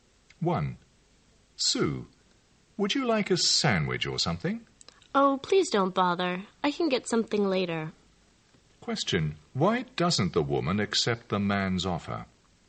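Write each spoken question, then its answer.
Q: Why doesn't the woman accept the man's offer?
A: She doesn't want him to bother; she can eat something later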